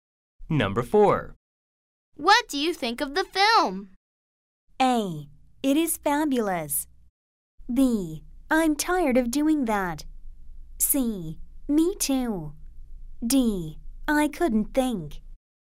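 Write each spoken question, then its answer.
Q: What do you think of the film?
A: A: It is fabulous.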